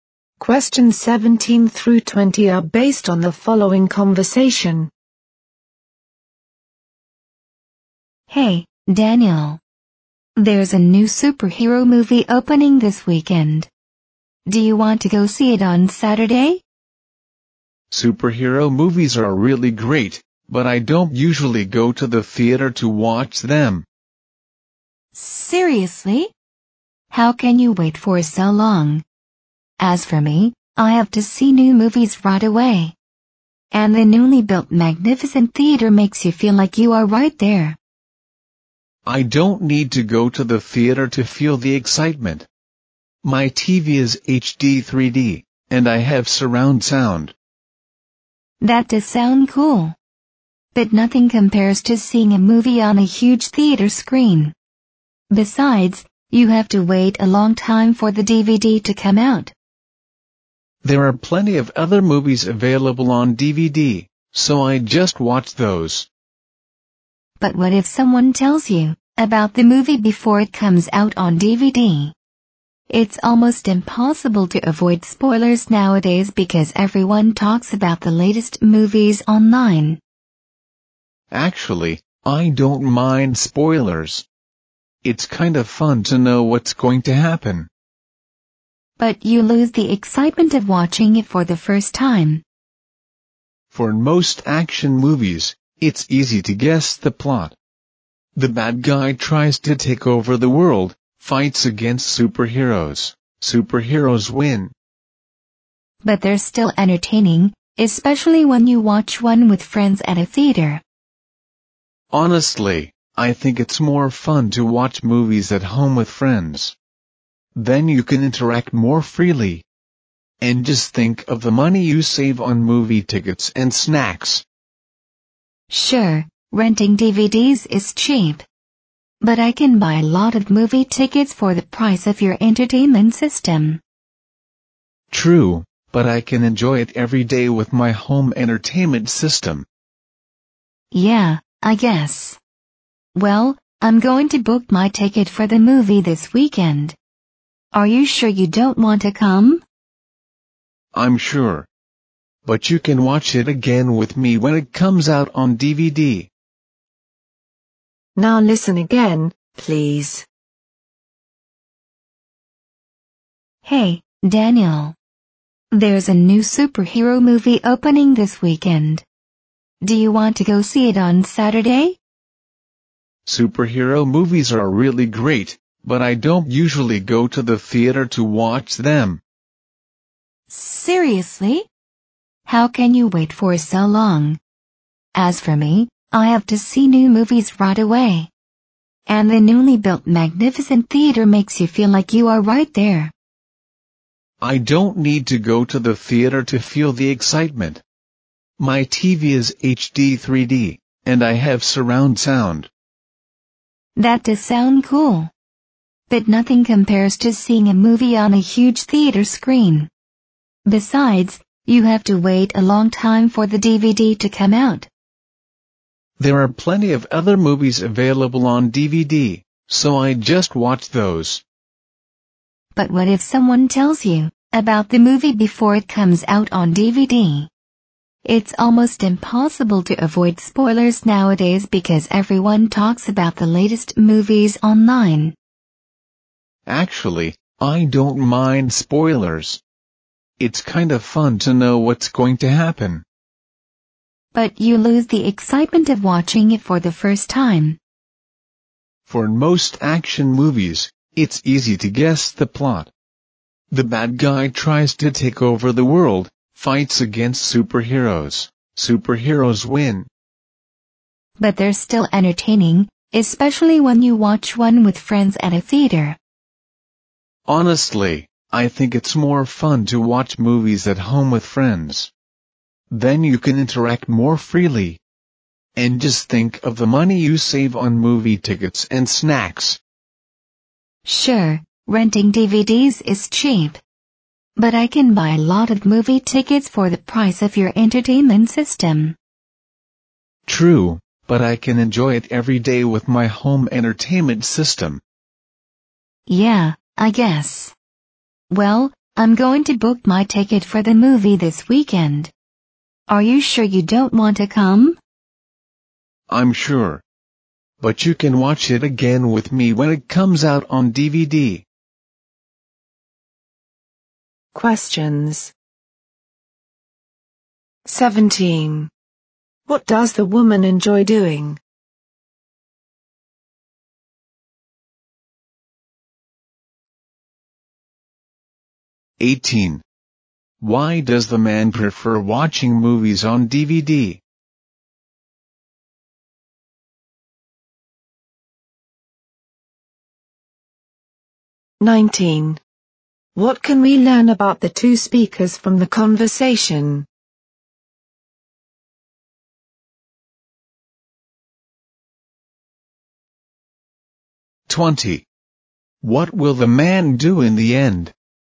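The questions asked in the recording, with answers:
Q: What does the woman enjoy doing?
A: Seeing new movies in the theater right away.

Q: What will the man do in the end?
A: Skip the theater and watch the movie on DVD later.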